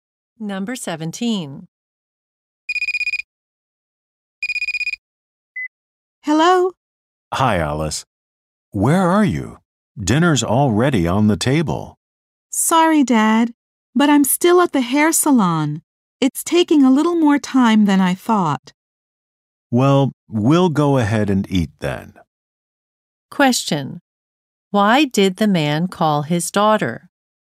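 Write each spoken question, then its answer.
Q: Why did the man call his daughter?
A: Dinner was ready.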